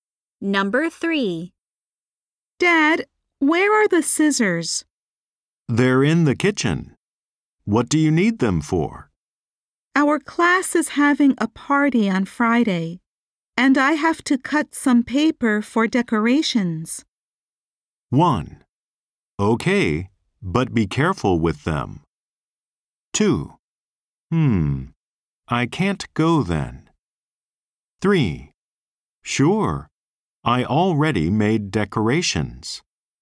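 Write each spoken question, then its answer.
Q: Our class is having a party on Friday, and I have to cut some paper for decorations.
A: 1: Okay, but be careful with them.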